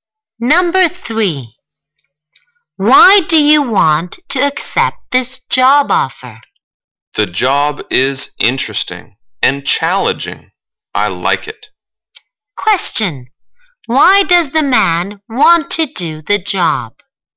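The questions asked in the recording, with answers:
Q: Why does the man want to do the job?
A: The job is interesting and challenging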